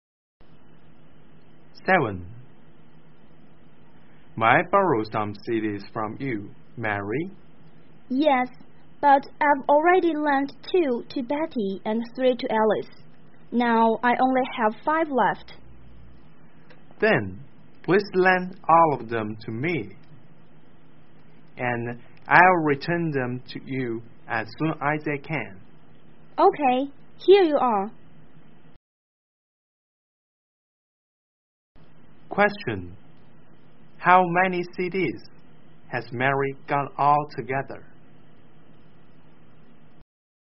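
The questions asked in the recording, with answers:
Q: How many CDs has Mary got all together?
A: 10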